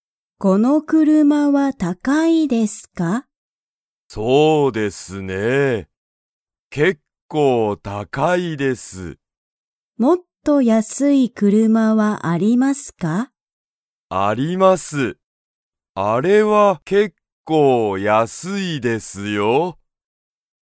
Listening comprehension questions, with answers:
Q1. 安(やす)い車(くるま)はありますか?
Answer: はい